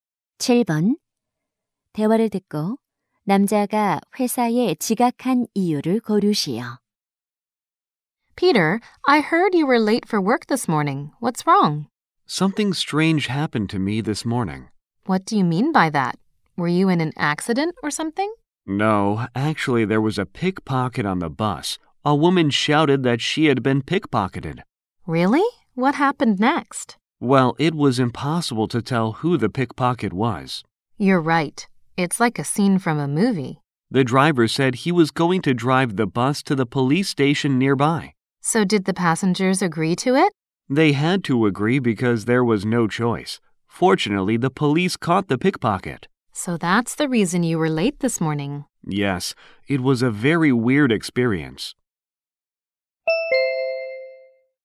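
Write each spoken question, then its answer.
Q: 대화를 듣고 남자가 회사에 지각한 이유를 고르시오.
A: 버스에서 소매치기 사건이 있어서 버스가 경찰서로 갔기 때문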